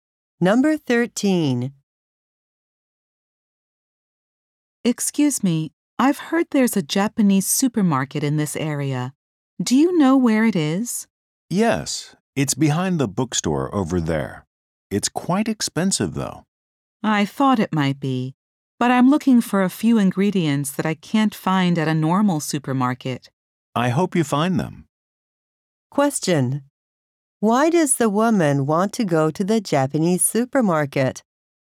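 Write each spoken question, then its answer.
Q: Why does the woman want to go to the Japanese supermarket?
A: To buy ingredients she can't find at a normal supermarket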